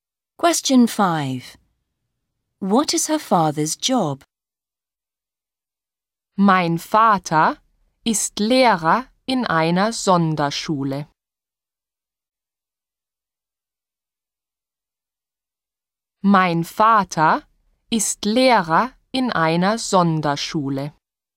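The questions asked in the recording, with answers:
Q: What is her father's job?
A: Teacher at a special school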